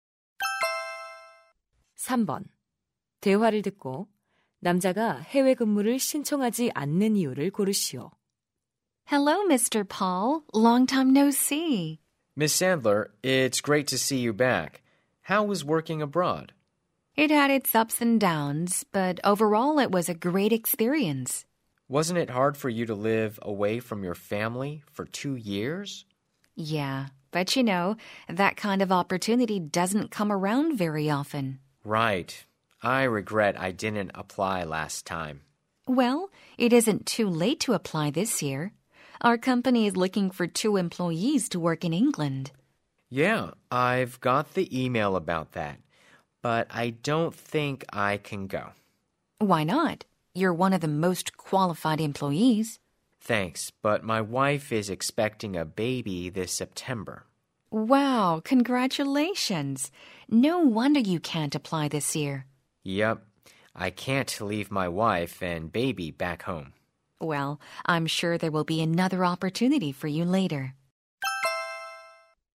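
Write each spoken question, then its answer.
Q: 대화를 듣고 남자가 해외 근무를 신청하지 않는 이유를 고르시오.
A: 아내가 9월에 출산 예정이라서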